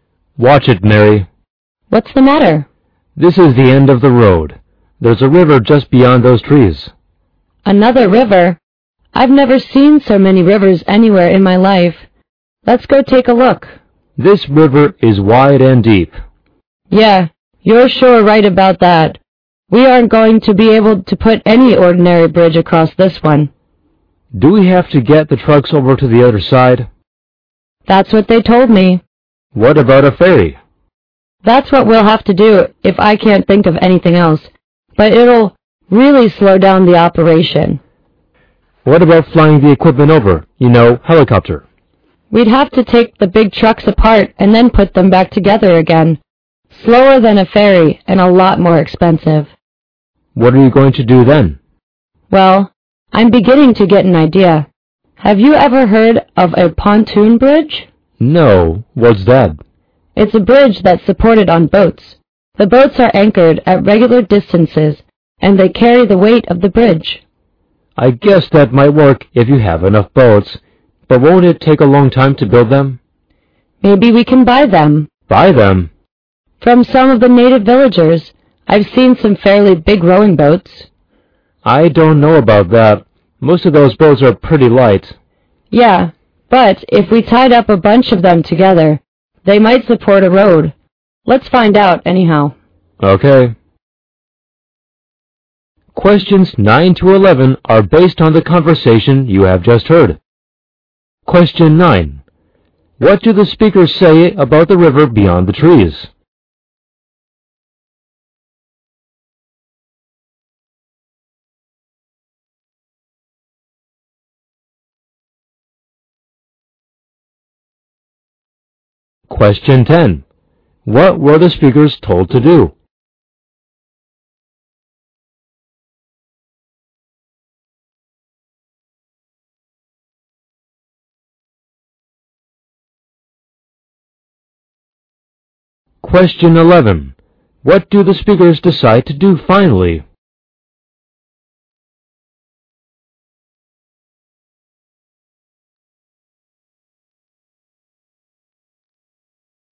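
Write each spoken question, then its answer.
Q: What do the speakers say about the river beyond the trees?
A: It is wide and deep

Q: What were the speakers told to do?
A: Get the trucks over to the other side of the river

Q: What do the speakers decide to do finally?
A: Try to buy boats from local villagers to build a pontoon bridge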